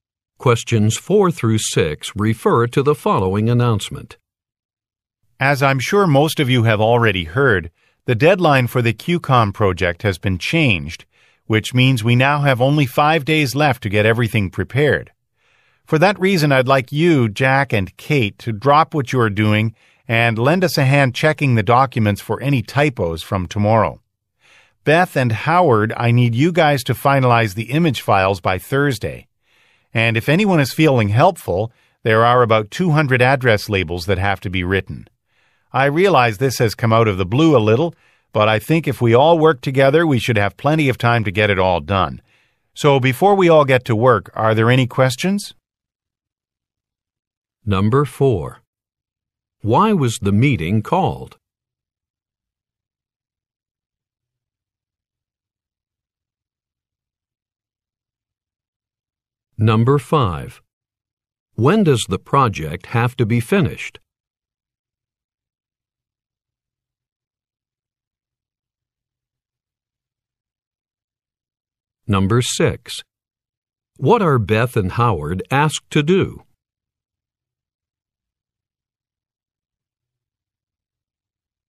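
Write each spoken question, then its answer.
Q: Why was the meeting called?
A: The project deadline was changed

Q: When does the project have to be finished?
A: In 5 days

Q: What are Beth and Howard asked to do?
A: Finalize the image files by Thursday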